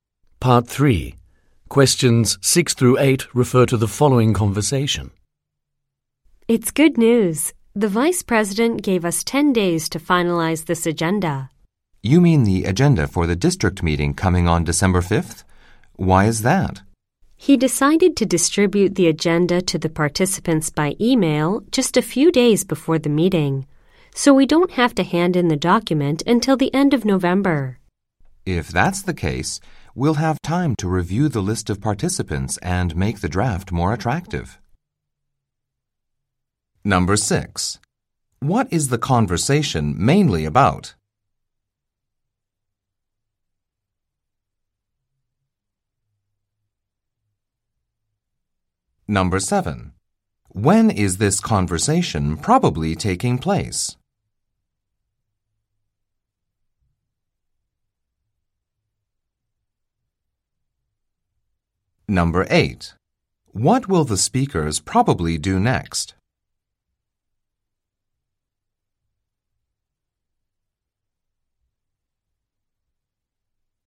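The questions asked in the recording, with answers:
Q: What is the conversation mainly about?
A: Finalizing the agenda for the district meeting, which now has a later deadline

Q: What will the speakers probably do next?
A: Review the list of participants and improve the draft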